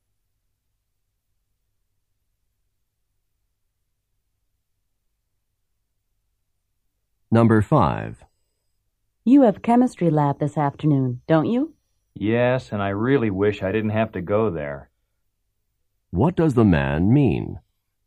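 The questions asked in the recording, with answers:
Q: What does the man mean?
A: He has to go to lab but doesn't want to.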